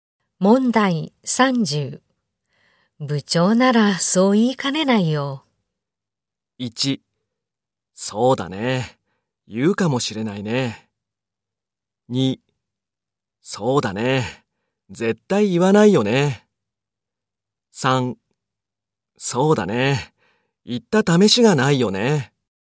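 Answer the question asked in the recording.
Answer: 1: そうだね、言うかもしれないね。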